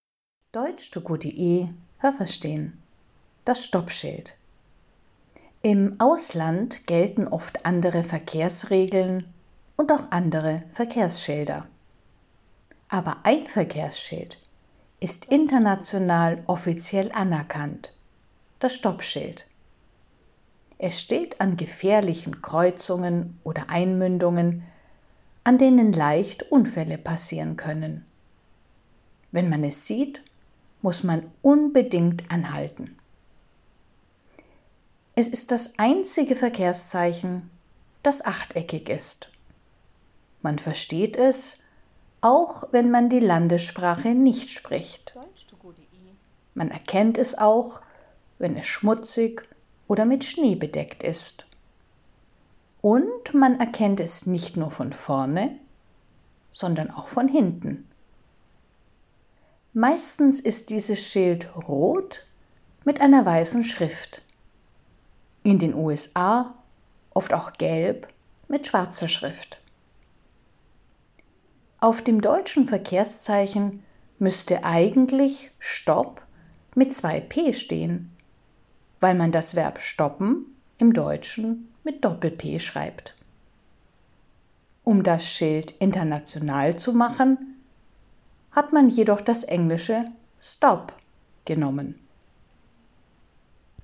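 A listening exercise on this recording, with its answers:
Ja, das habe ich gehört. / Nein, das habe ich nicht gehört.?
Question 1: Das Stoppschild ist international anerkannt.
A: Ja, das habe ich gehört.

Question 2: Es steht an gefährlichen Kreuzungen und man kann dort anhalten.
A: Nein, das habe ich nicht gehört.

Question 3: Es gibt viele Verkehrszeichen, die achteckig sind.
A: Nein, das habe ich nicht gehört.

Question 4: Man kann das Verkehrszeichen auch erkennen, wenn es schmutzig ist.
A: Ja, das habe ich gehört.

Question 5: Man erkennt das Verkehrszeichen auch von hinten.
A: Ja, das habe ich gehört.

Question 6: Das Verkehrszeichen ist meistens weiß mit roter Schrift.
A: Nein, das habe ich nicht gehört.

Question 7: Eigentlich müsste auf deutschen Stoppschildern „Stopp" stehen, aber es steht „Stop".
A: Ja, das habe ich gehört.

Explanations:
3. Das Stoppschild ist das einzige Verkehrszeichen, das acht Ecken hat.
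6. Es ist genau umgekehrt: Es ist rot mit weißer Schrift.

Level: A2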